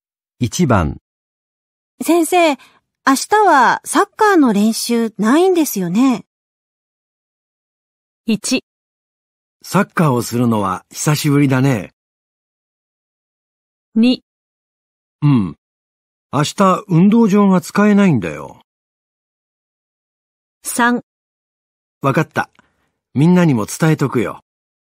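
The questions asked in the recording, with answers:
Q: 先生、明日はサッカーの練習ないんですよね。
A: 2: うん。明日運動場が使えないんだよ。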